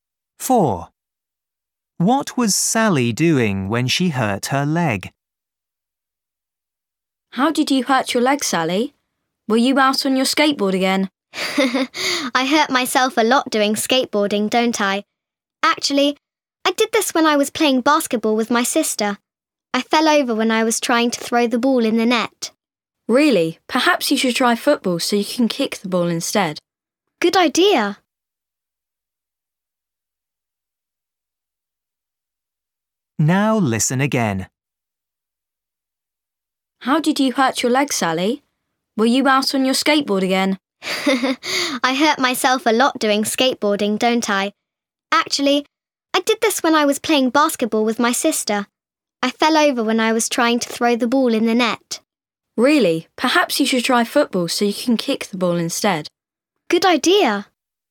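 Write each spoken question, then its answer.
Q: What was Sally doing when she hurt her leg?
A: playing basketball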